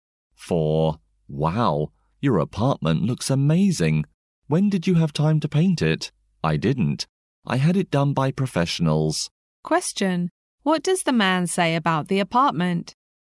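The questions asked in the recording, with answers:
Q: What does the man say about the apartment?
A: Professionals painted it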